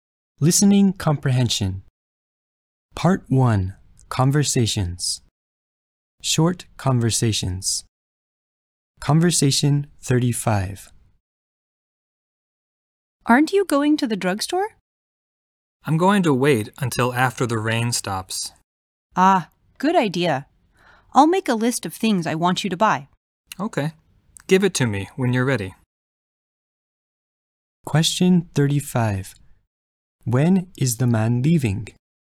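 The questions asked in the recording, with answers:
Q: When is the man leaving?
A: After the rain stops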